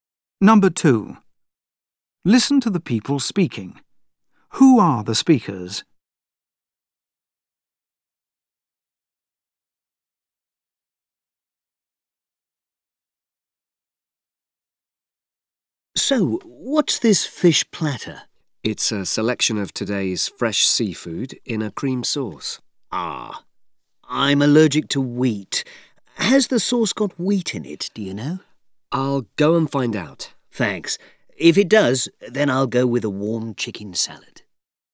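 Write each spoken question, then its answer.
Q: Who are the speakers?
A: A customer and a waiter in a restaurant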